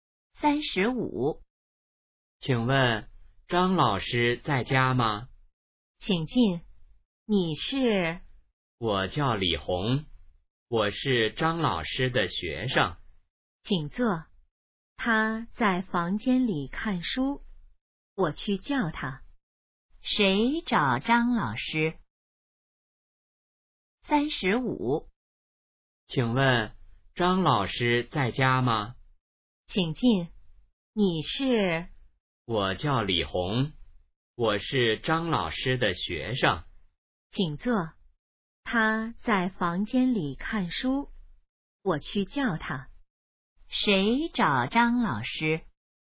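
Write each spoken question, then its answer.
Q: 谁找张老师?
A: 李红(张老师的学生)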